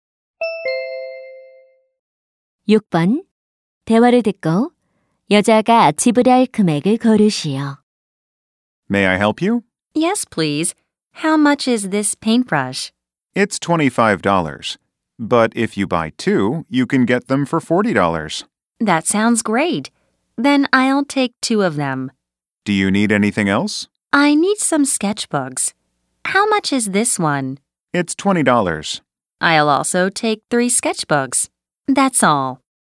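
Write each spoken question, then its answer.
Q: 대화를 듣고 여자가 지불할 금액을 고르시오.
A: $100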